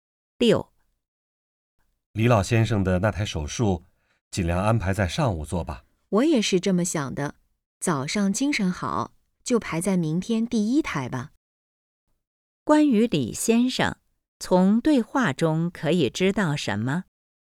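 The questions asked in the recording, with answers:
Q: 关于李先生,从对话中可以知道什么?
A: 他的手术安排在明天上午第一台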